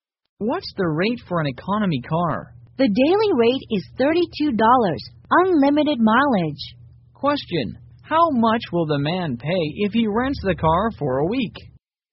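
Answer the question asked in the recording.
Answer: $224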